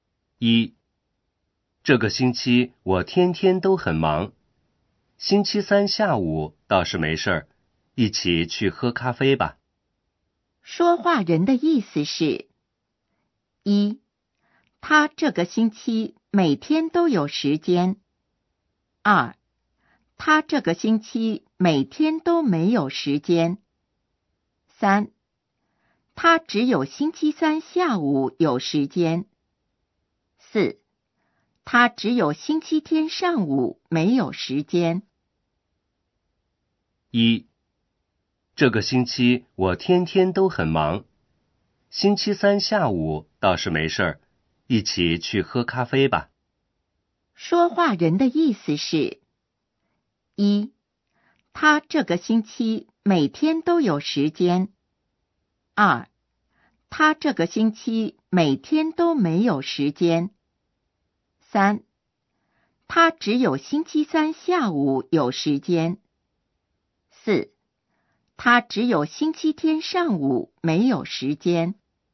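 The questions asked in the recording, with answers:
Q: 说话人的意思是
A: 三: 他只有星期三下午有时间。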